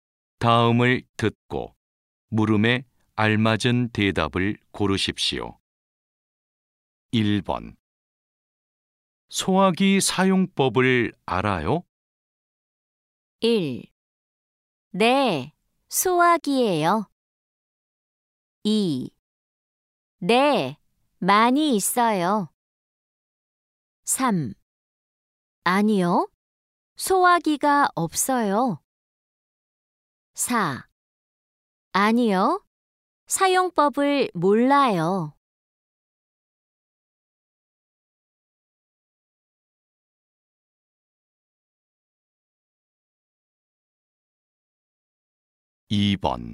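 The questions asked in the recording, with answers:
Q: 소화기 사용법을 알아요?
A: 4: 아니요, 사용법을 몰라요.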